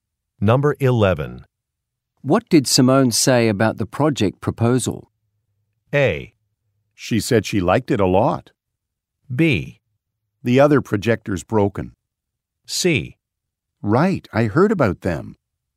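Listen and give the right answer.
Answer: A: She said she liked it a lot.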